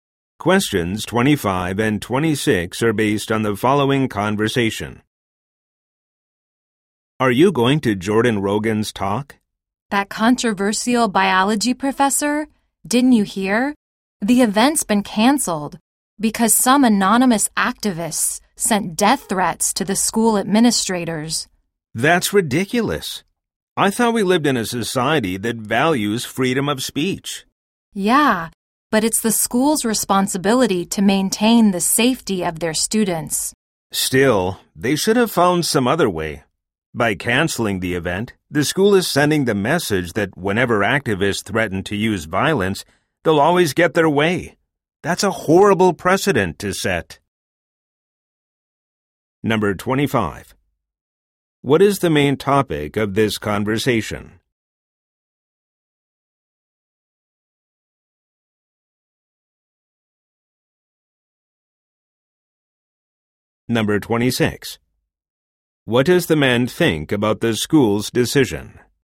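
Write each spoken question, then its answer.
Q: What is the main topic of this conversation?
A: The cancellation of a controversial professor's talk

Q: What does the man think about the school's decision?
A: He disagrees; it sets a bad precedent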